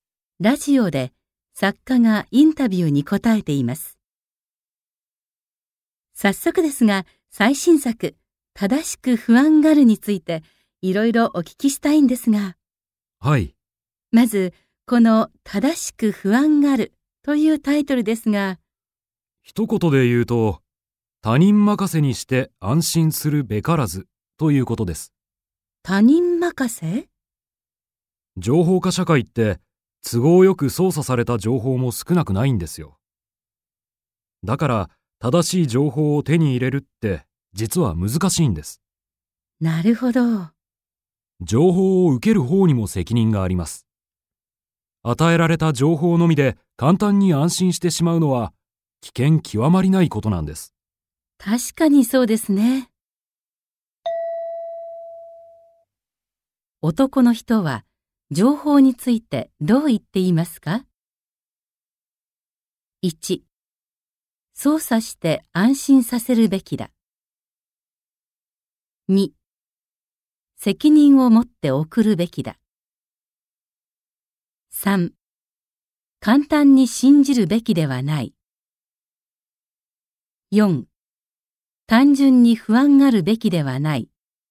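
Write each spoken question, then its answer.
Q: 男の人は情報についてどう言っていますか?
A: 3: 簡単に信じるべきではない。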